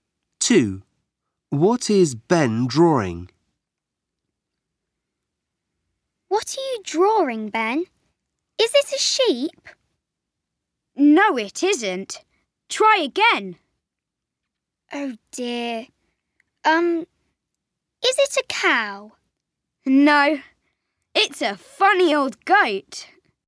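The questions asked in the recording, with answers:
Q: what is Ben drawing?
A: A goat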